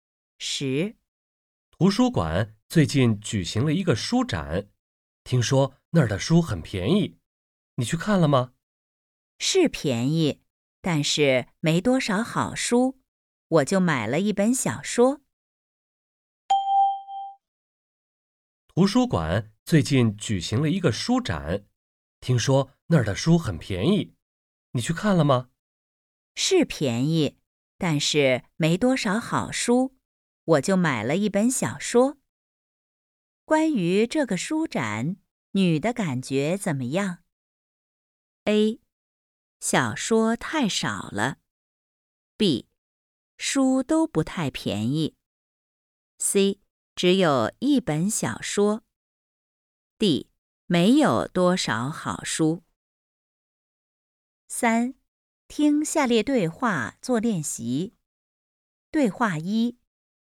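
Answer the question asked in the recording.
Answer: D: 没有多少好书。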